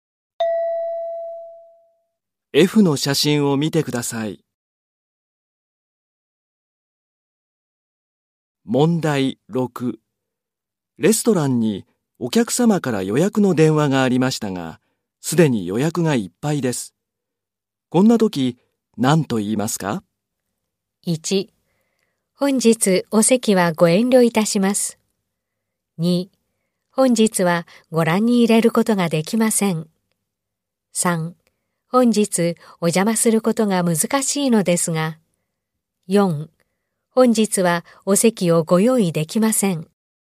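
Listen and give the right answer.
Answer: 4: 本日はお席をご用意できません。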